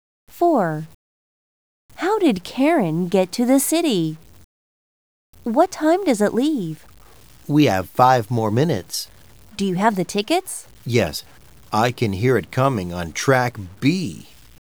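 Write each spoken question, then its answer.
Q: How did Karen get to the city?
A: By train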